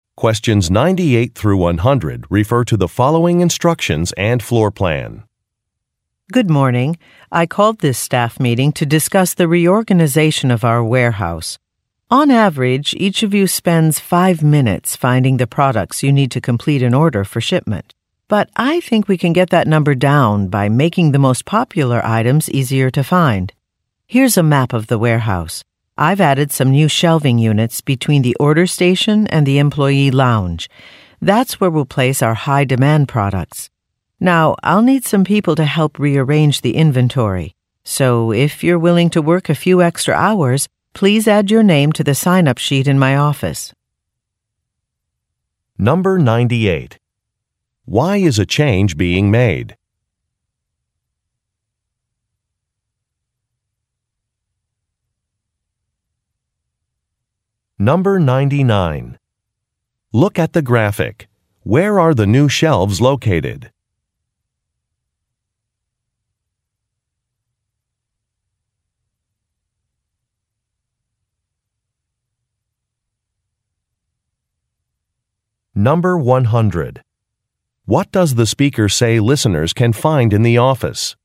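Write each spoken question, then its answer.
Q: Why is a change being made?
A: To cut the time workers spend finding products for orders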